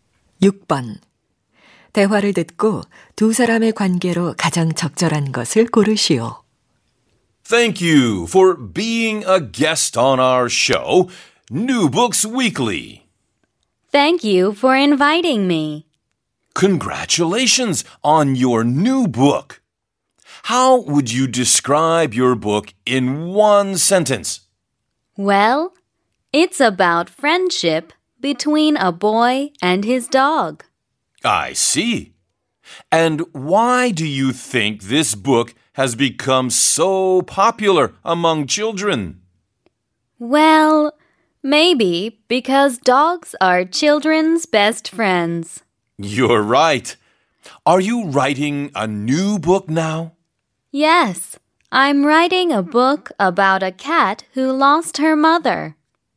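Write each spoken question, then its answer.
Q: 대화를 듣고 두 사람의 관계로 가장 적절한 것을 고르시오.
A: 방송 진행자 - 작가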